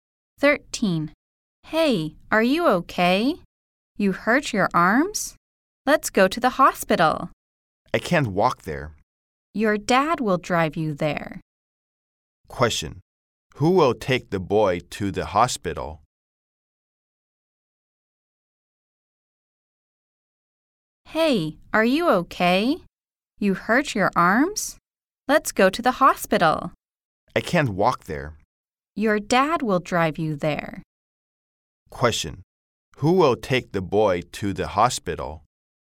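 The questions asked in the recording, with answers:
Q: Who will take the boy to the hospital?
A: His dad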